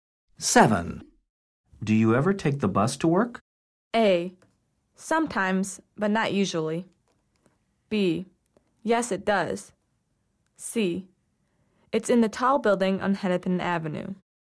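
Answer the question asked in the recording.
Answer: A: Sometimes, but not usually.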